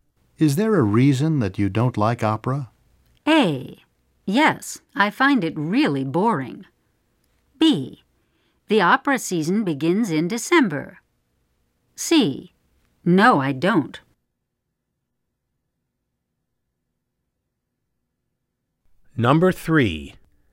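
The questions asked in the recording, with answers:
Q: Is there a reason that you don't like opera?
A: A: Yes, I find it really boring.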